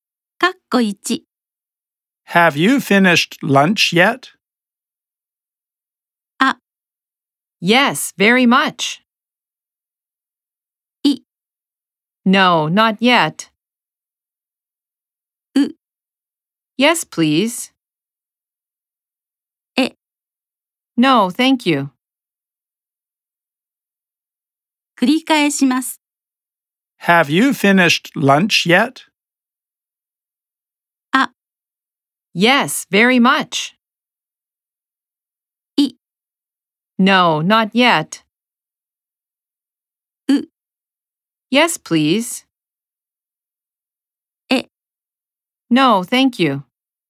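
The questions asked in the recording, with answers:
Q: Have you finished lunch yet?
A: I: No, not yet.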